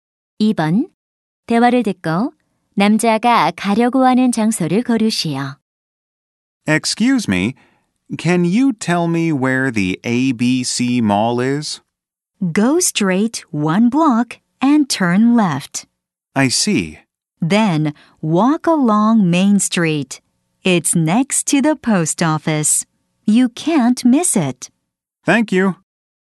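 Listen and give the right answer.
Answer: ABC 쇼핑몰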